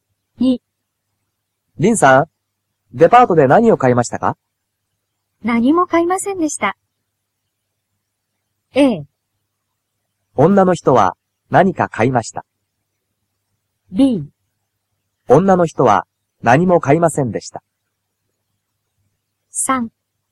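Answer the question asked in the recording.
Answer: B: 女の人は何も買いませんでした。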